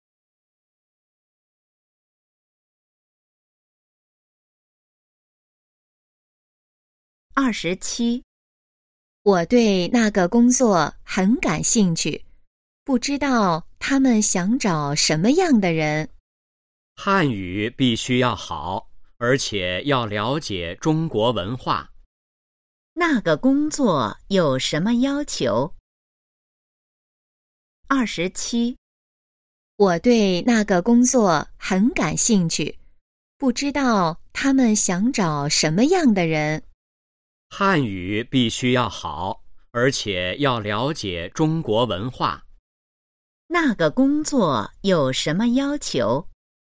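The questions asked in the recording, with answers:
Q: 那个工作有什么要求?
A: 汉语好,了解中国文化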